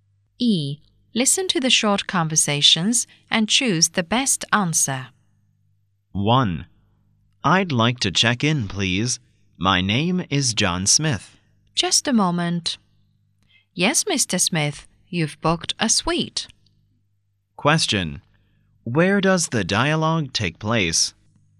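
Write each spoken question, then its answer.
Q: Where does the dialogue take place?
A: At a hotel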